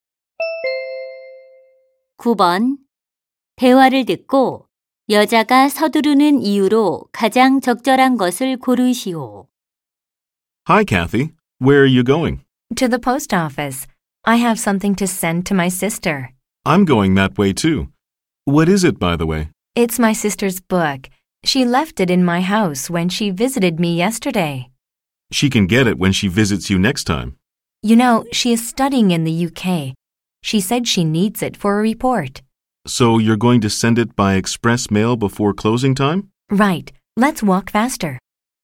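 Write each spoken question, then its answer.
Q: 대화를 듣고 여자가 서두르는 이유로 가장 적절한 것을 고르시오.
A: 마감 시간 전에 언니의 책을 빠른우편으로 보내야 해서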